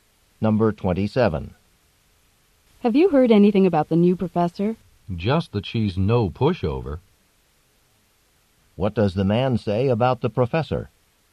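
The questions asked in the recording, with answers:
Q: What does the man say about the professor?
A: She is strict and demanding (not easy to deal with).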